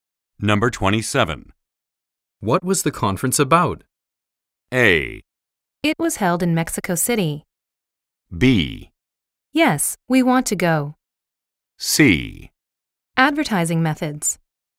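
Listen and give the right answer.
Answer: C: Advertising methods.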